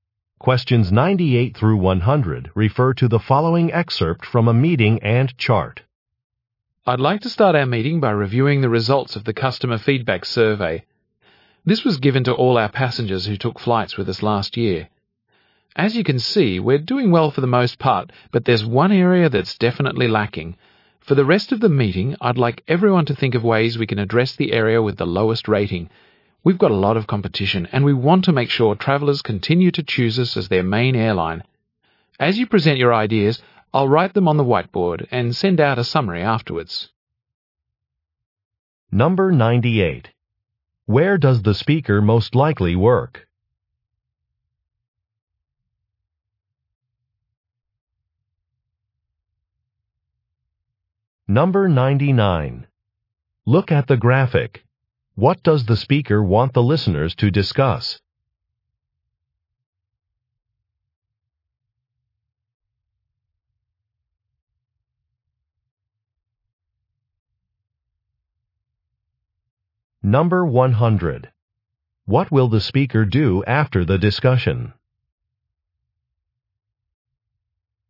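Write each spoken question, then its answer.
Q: Where does the speaker most likely work?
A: At an airline

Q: What will the speaker do after the discussion?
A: Send out a summary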